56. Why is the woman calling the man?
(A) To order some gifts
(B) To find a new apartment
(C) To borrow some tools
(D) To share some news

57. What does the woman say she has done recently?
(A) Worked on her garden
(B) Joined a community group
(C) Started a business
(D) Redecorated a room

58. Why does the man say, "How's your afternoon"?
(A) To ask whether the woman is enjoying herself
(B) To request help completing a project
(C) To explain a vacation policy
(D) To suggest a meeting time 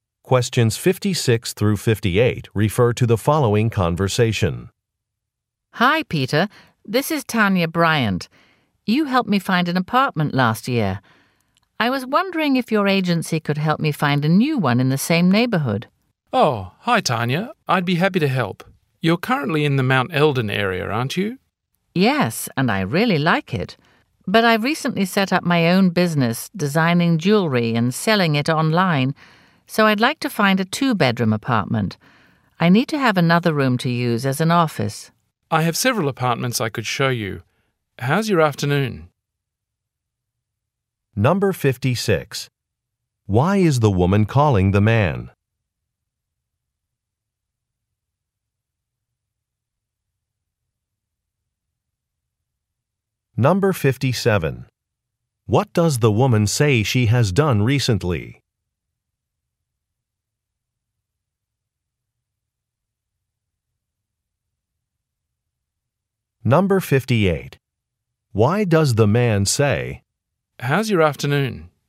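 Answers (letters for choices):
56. B
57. C
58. D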